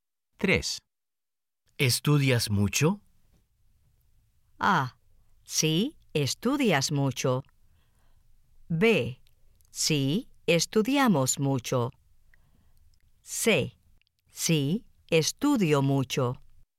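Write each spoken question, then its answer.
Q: ¿Estudias mucho?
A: C: Sí, estudio mucho.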